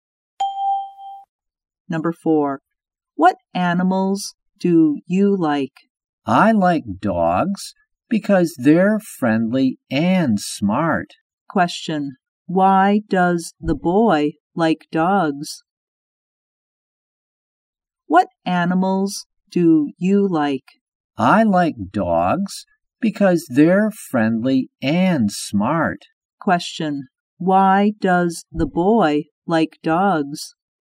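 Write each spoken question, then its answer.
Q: Question, why does the boy like dogs?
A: Because they're friendly and smart.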